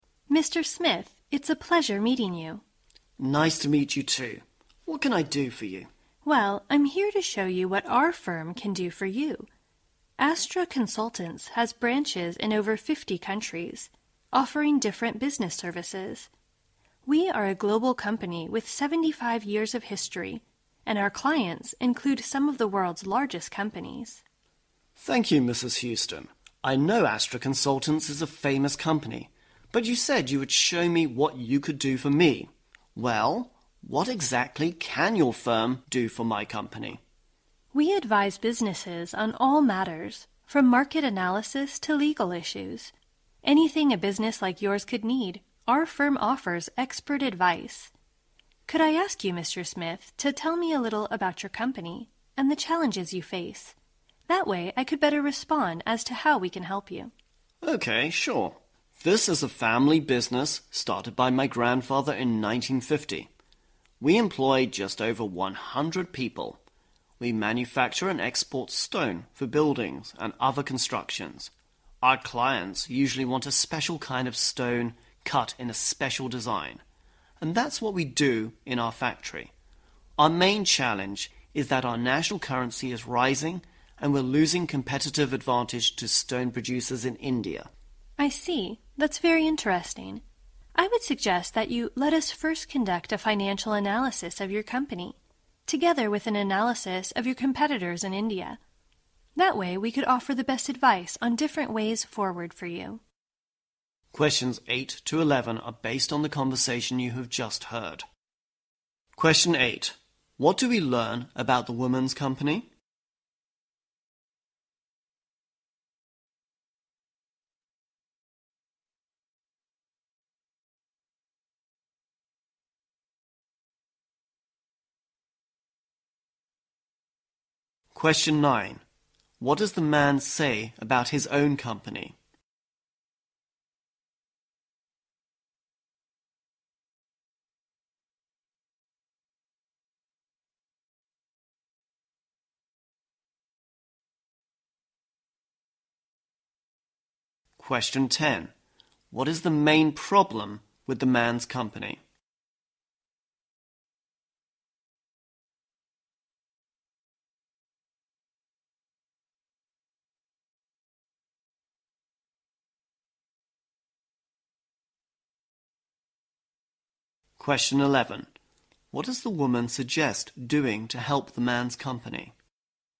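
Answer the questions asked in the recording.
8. It is a global company with 75 years of history and branches in over 50 countries.
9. It is a family business started by his grandfather in 1950.
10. The rising national currency is costing it its competitive advantage over stone producers in India.
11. Conduct a financial analysis of his company and an analysis of his competitors in India.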